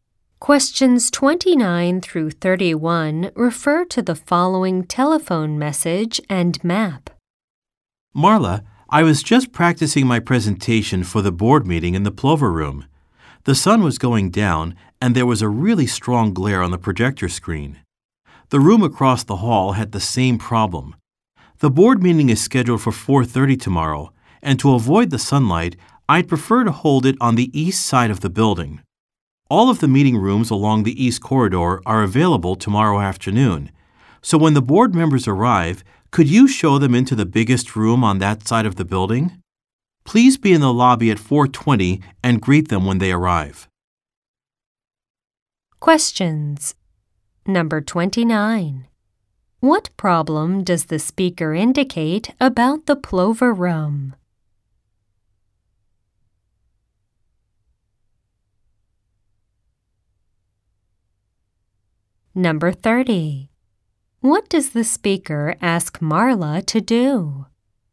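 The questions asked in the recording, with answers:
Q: What problem does the speaker indicate about the Plover Room?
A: There is strong glare from the sun on the projector screen.

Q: What does the speaker ask Marla to do?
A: Greet the board members in the lobby at 4:20 and show them to the biggest room on the east side.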